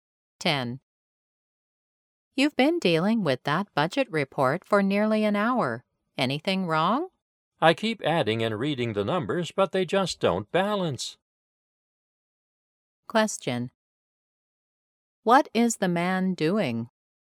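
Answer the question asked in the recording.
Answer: Checking the numbers of a budget report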